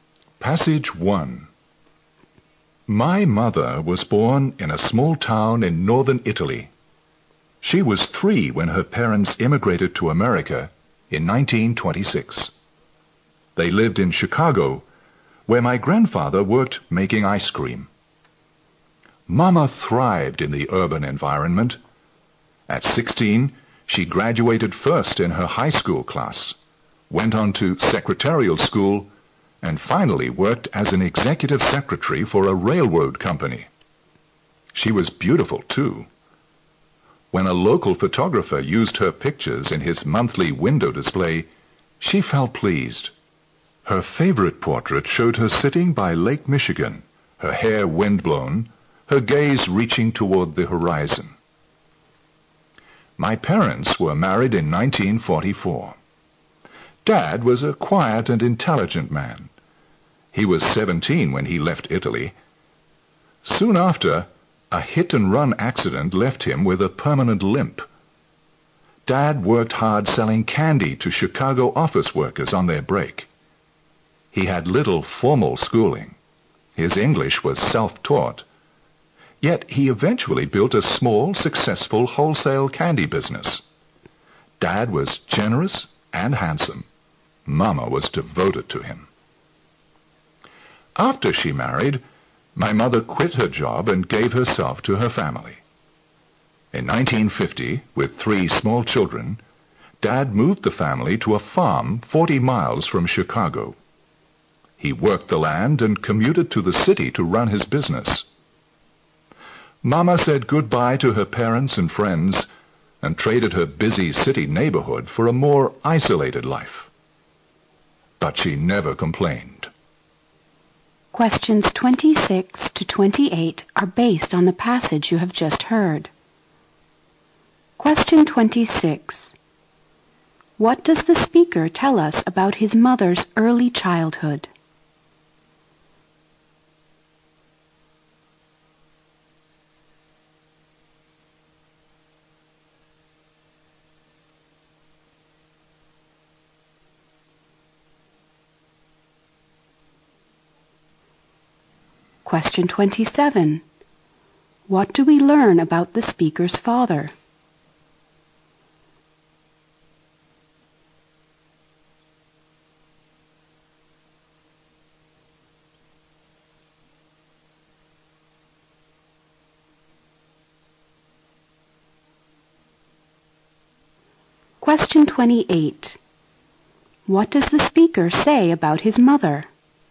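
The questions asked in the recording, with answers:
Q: What does the speaker tell us about his mother's early childhood?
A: She immigrated from Italy to America with her parents when she was 3.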